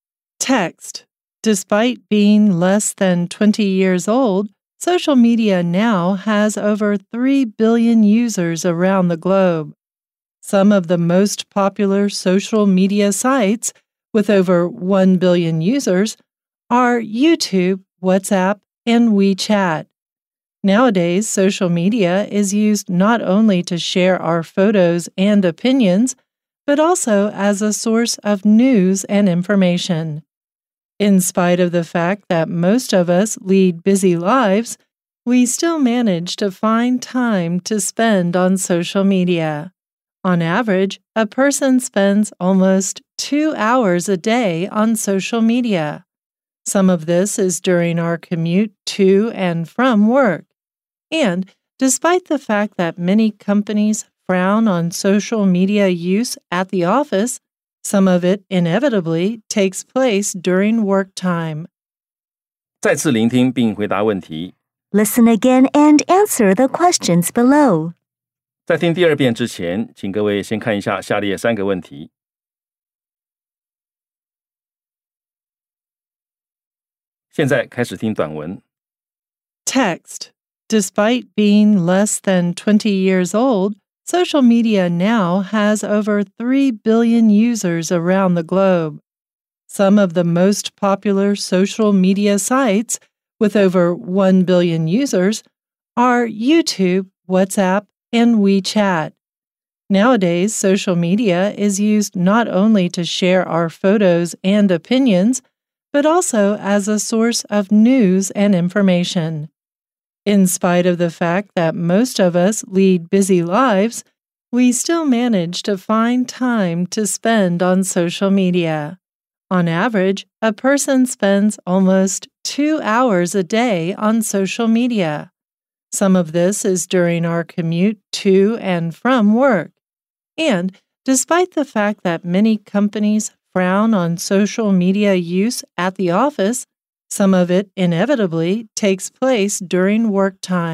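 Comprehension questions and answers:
再次聆聽並回答問題 Listen again and answer the questions below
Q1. How many people use social media around the world?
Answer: Over 3 billion people.

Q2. Aside from sharing photos and opinions, what can social media also be used for?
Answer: As a source of news and information.

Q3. How long does a person spend on social media per day on average?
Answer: Almost 2 hours a day.

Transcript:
Despite being less than twenty years old, social media now has over 3 billion users around the globe. Some of the most popular social media sites, with over 1 billion users, are YouTube, WhatsApp, and WeChat. Nowadays, social media is used not only to share our photos and opinions, but also as a source of news and information.
In spite of the fact that most of us lead busy lives, we still manage to find time to spend on social media. On average, a person spends almost two hours a day on social media. 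Some of this is during our commute to and from work. And, despite the fact that many companies frown on social media use at the office, some of it inevitably takes place during work time.

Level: 中階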